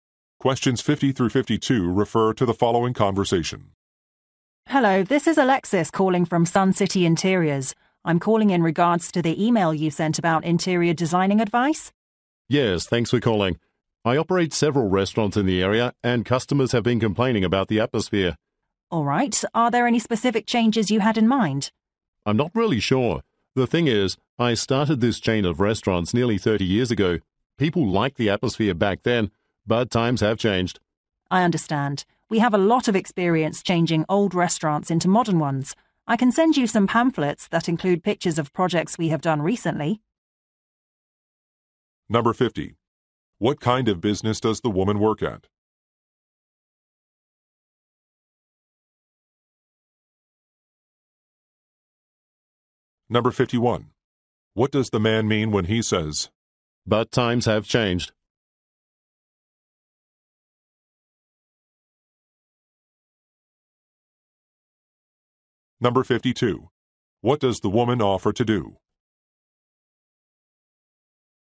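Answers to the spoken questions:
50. An interior design company
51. His restaurants' atmosphere is outdated
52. Send pamphlets with pictures of recent projects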